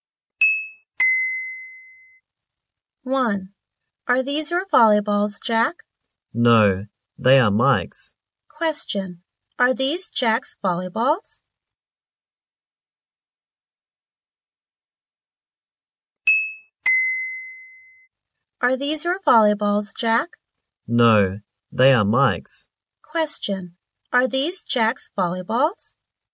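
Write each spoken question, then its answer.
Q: Are these Jack's volleyballs?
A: No, they are Mike's.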